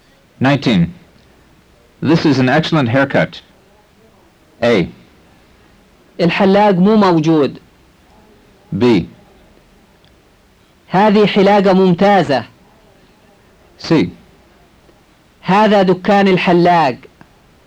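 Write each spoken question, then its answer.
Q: This is an excellent haircut.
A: B: هذه حلاقة ممتازة.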